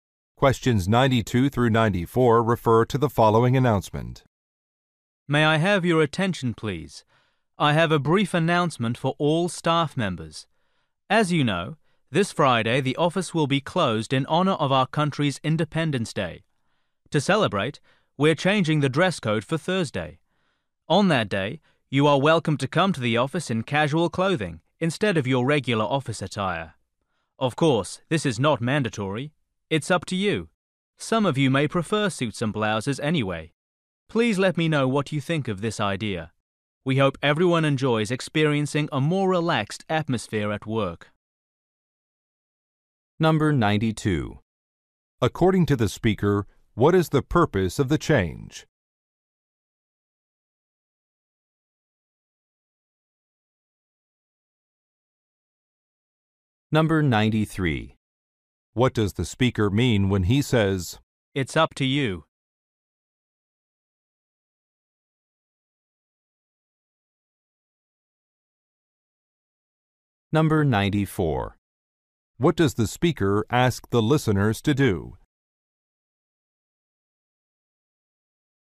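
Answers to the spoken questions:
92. To celebrate Independence Day
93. Wearing casual clothes is optional
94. Give feedback on the idea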